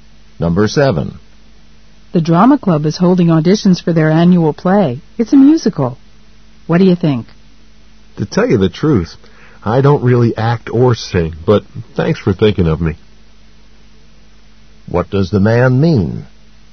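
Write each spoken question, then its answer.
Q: What does the man mean?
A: He isn't interested in auditioning because he doesn't act or sing.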